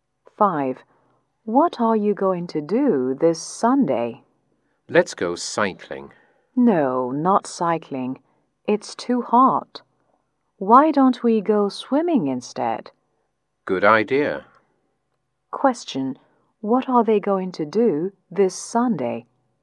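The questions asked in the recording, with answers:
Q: What are they going to do this Sunday?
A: Go swimming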